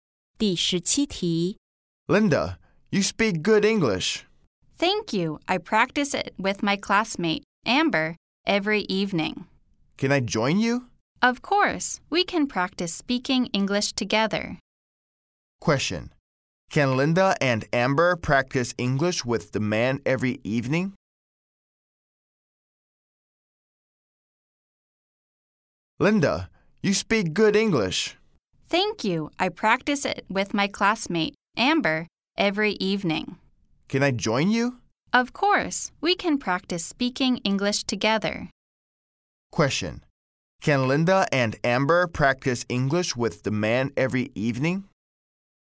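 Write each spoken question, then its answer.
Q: Can Linda and Amber practice English with the man every evening?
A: Yes, they can.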